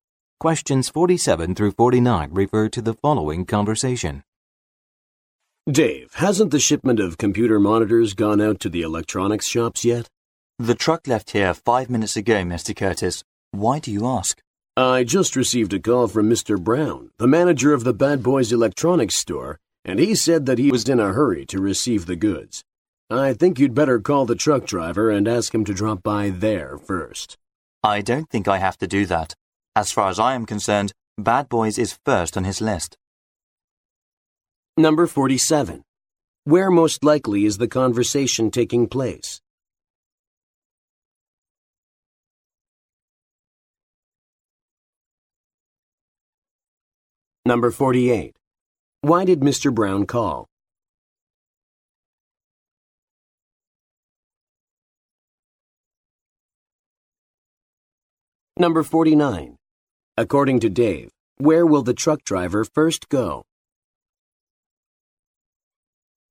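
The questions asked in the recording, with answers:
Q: Where most likely is the conversation taking place?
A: At a warehouse

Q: Why did Mr. Brown call?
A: He was in a hurry to receive the goods

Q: According to Dave, where will the truck driver first go?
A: The Bad Boys Electronics store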